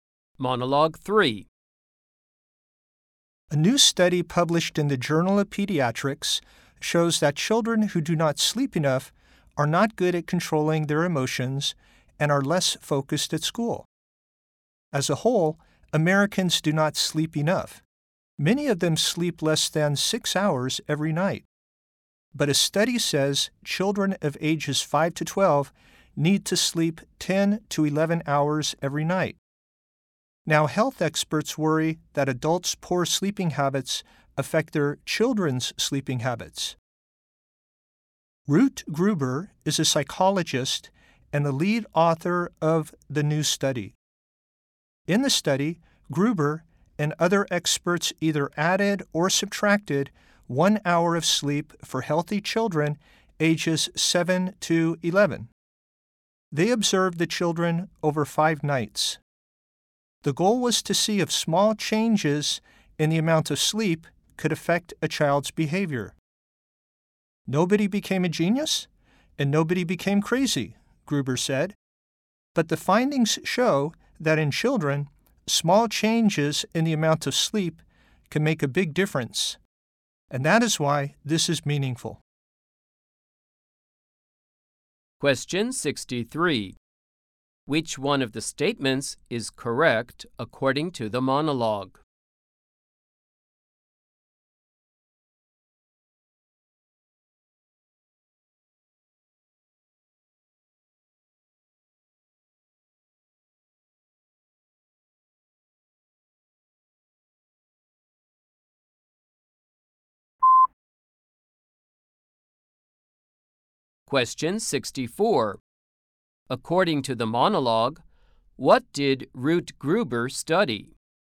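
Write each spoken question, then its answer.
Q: According to the monologue, what did Ruth Gruber study?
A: How small changes in sleep affect children's behavior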